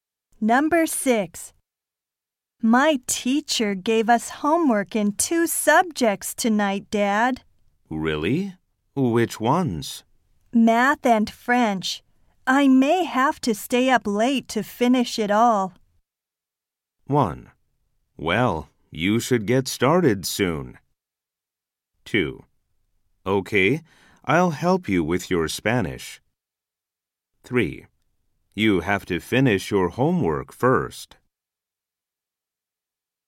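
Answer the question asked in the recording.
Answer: 1: Well, you should get started soon.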